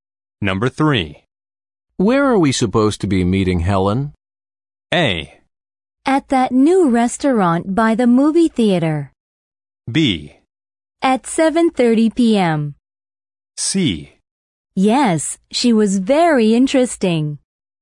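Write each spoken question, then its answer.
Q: Where are we supposed to be meeting Helen?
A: A: At that new restaurant by the movie theater.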